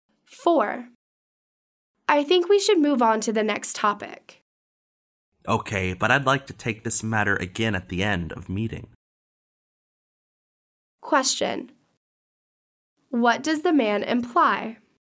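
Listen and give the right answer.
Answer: He wants to discuss the matter again at the end of the meeting.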